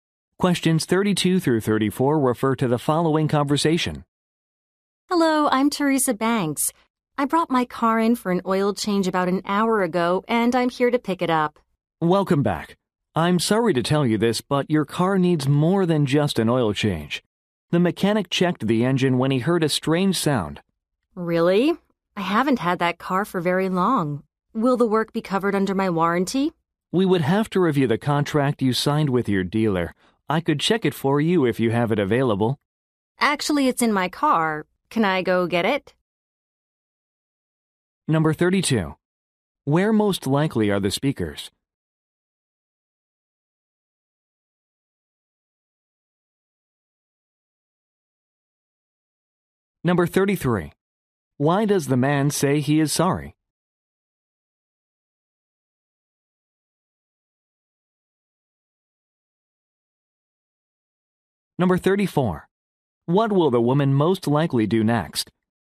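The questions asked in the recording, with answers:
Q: Where most likely are the speakers?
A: At a car repair shop

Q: Why does the man say he is sorry?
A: The car needs more work than just an oil change

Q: What will the woman most likely do next?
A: Get the contract from her car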